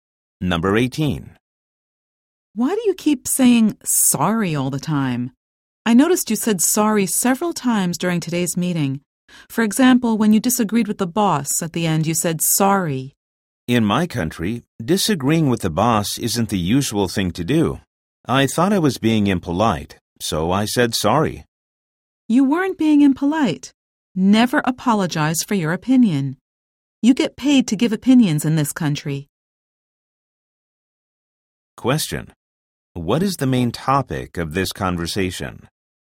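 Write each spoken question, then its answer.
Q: What is the main topic of this conversation?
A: Cultural differences in apologizing and disagreeing with the boss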